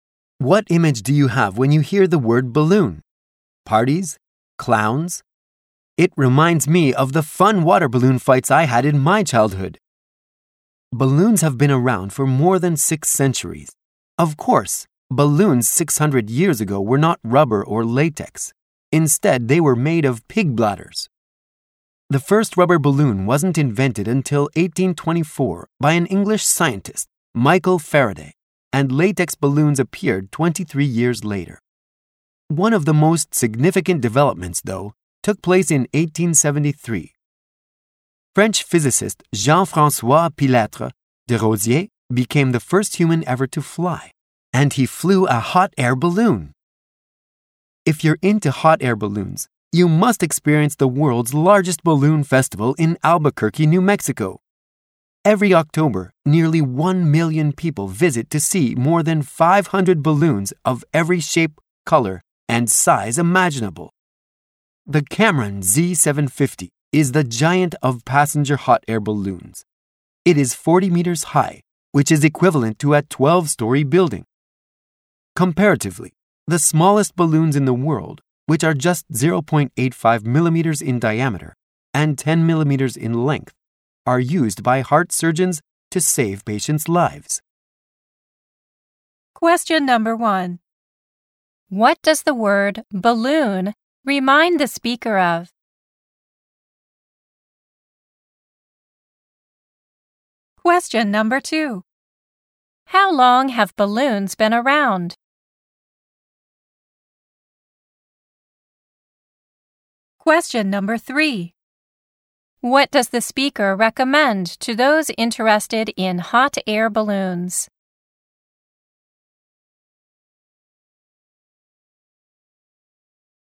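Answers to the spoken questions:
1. The fun water balloon fights in the speaker's childhood
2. For more than 6 centuries
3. Experiencing the world's largest balloon festival in Albuquerque, New Mexico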